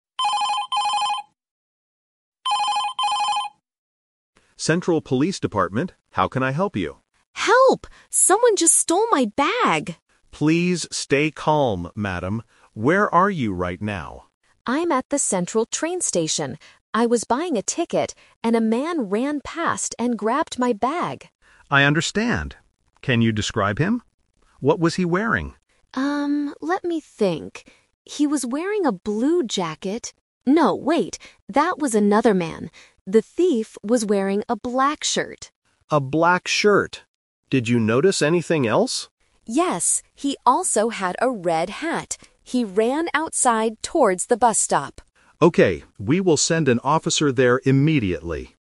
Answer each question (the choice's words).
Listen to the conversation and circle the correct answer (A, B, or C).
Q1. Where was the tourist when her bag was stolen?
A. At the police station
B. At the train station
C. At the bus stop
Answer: At the train station

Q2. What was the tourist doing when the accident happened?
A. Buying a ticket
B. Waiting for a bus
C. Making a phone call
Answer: Buying a ticket

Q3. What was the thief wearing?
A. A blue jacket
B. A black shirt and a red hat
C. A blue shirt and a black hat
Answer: A black shirt and a red hat

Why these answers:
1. The tourist clearly states, "I'm at the central train station." Option (C) is a trap because she mentions the bus stop later, but that is where the thief ran to, not where the theft happened. Option (A) is who she is calling.
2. She says, "I was buying a ticket, and a man ran past and grabbed my bag." Option (B) is a trap related to the bus stop. Option (C) is a trap because she is making a phone call now, but she wasn't doing it when the bag was stolen.
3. This question uses "The Twist". The tourist first remembers a "blue jacket" (Option A - Trap), but quickly corrects herself ("no, wait! That was another man"). She confirms the thief was wearing "a black shirt" and "a red hat". Option (C) mixes up the colors.

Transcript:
Police Officer: Central Police Department, how can I help you?
Tourist: Help! Someone just stole my bag!
Police Officer: Please stay calm, madam. Where are you right now?
Tourist: I'm at the central train station. I was buying a ticket, and a man ran past and grabbed my bag.
Police Officer: I understand. Can you describe him? What was he wearing?
Tourist: Um, let me think. He was wearing a blue jacket... no, wait! That was another man. The thief was wearing a black shirt.
Police Officer: A black shirt. Did you notice anything else?
Tourist: Yes, he also had a red hat. He ran outside towards the bus stop.
Police Officer: Okay, we will send an officer there immediately.